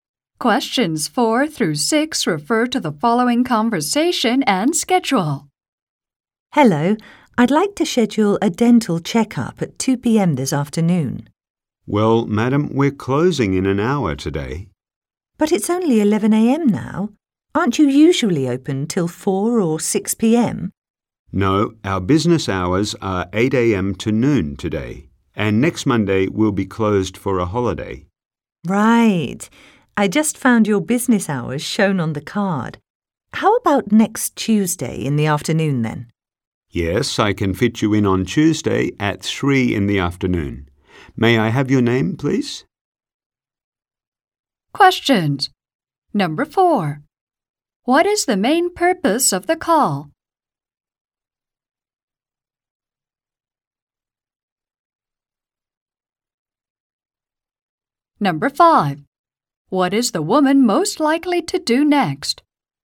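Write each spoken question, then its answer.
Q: What is the main purpose of the call?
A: To make a dental appointment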